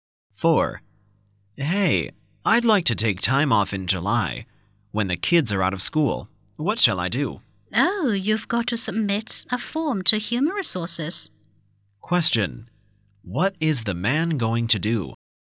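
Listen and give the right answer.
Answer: Submit a form to Human Resources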